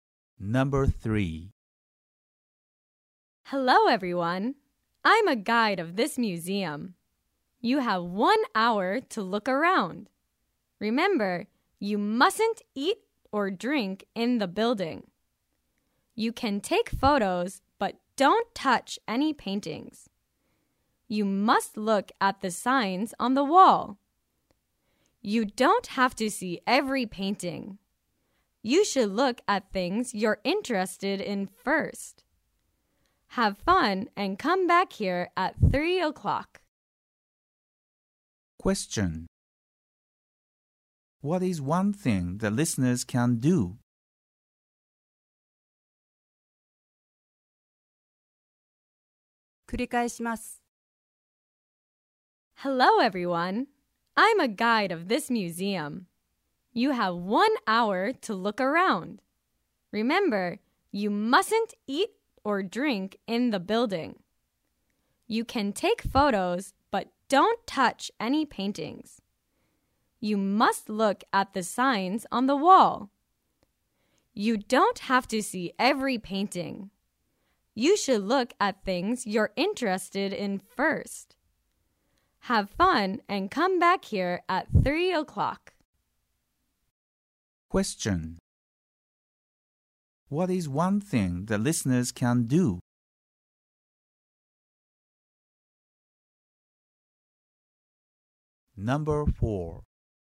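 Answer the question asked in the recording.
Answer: Take photos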